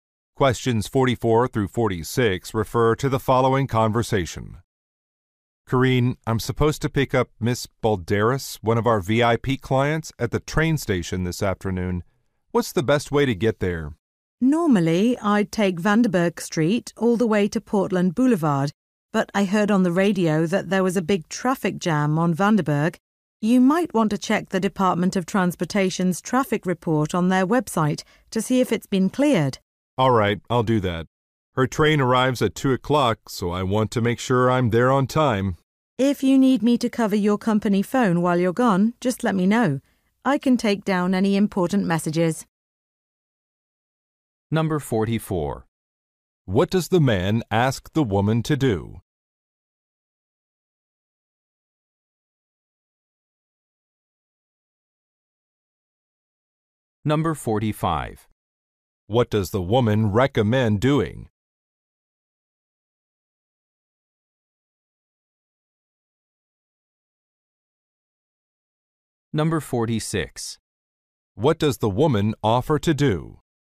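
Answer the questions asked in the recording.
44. Tell him the best way to get to the train station
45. Checking the traffic report on the website
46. Cover his phone and take messages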